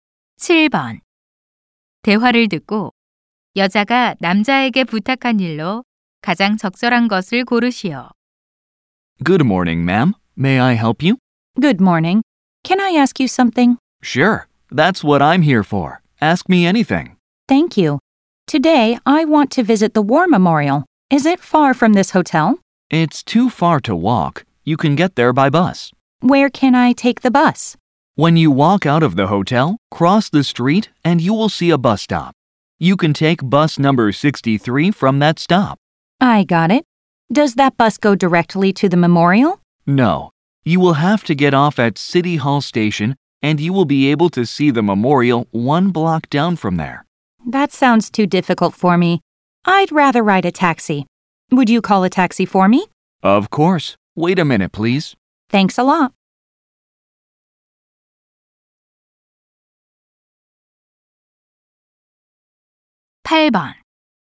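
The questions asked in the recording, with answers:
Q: 대화를 듣고 여자가 남자에게 부탁한 일로 가장 적절한 것을 고르시오.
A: 택시 불러 주기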